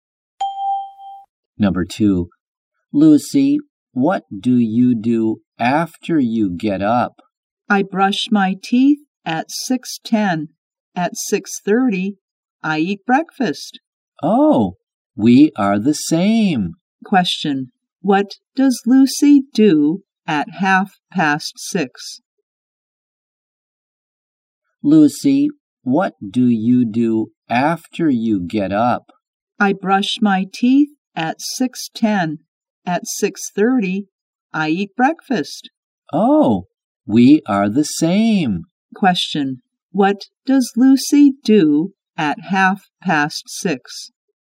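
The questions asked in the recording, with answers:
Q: what does Lucy do at 6:30?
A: She eats breakfast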